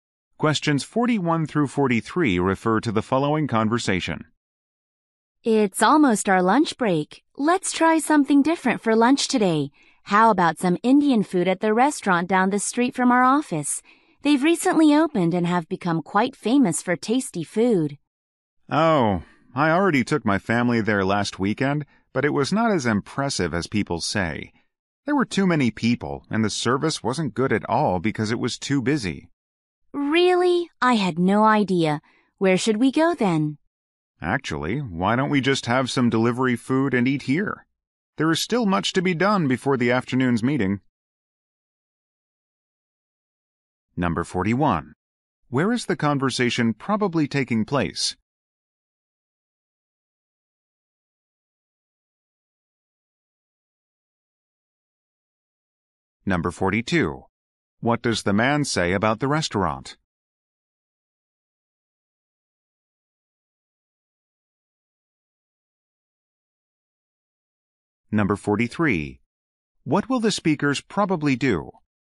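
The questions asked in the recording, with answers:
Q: Where is the conversation probably taking place?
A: In an office

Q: What will the speakers probably do?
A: Order delivery food and eat at the office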